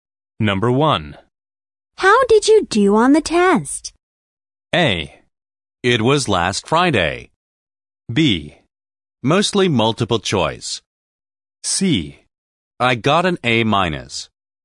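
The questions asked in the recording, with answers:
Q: How did you do on the test?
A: C: I got an A minus.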